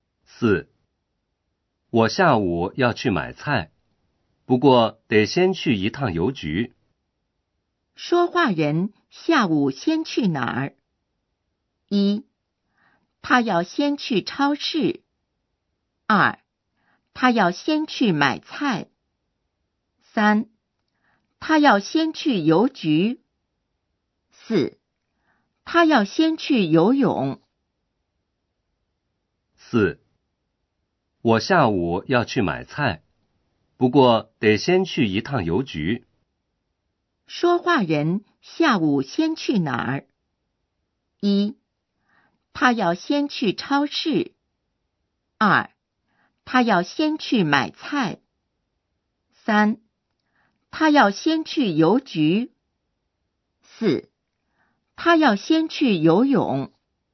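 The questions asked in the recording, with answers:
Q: 说话人下午先去哪儿?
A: 三: 他要先去邮局。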